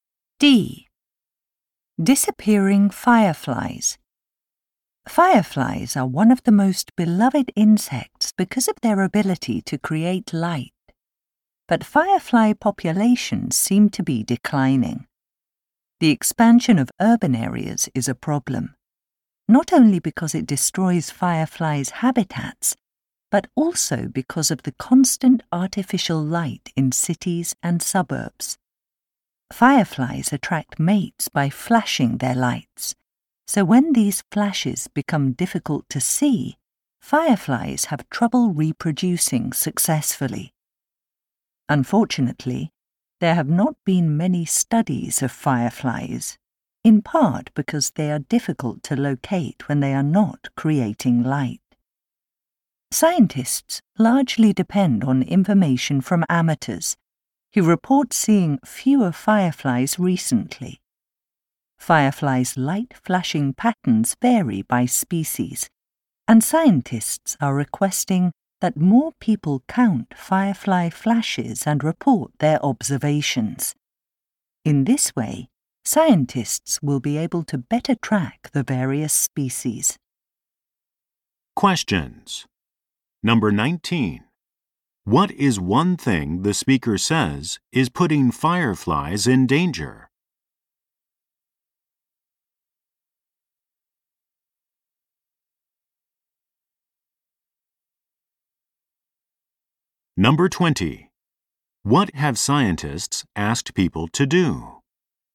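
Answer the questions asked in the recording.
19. Artificial light in cities and suburbs makes it hard for them to find mates.
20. Count firefly flashes and report their observations.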